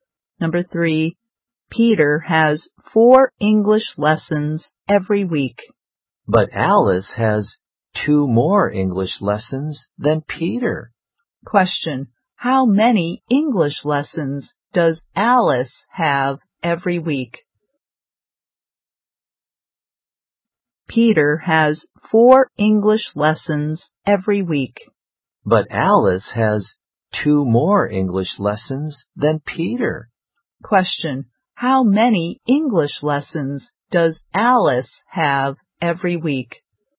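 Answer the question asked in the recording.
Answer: Six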